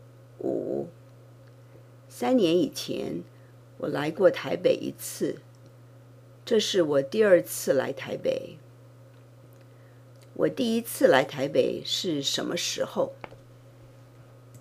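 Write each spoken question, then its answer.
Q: 我第一次来台北是什么时候?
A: 三年以前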